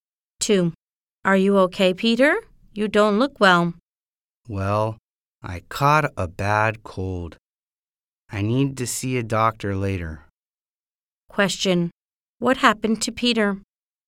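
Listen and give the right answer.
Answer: He caught a bad cold.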